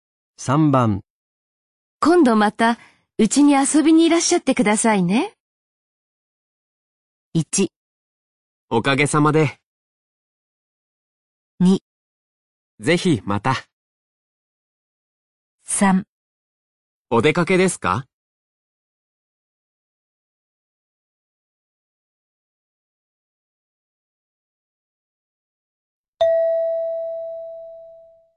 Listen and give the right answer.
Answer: 2

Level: N3 Listening · Test 12